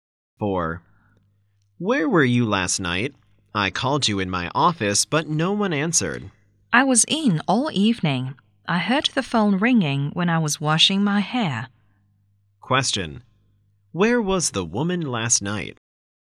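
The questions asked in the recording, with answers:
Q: Where was the woman last night?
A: At home.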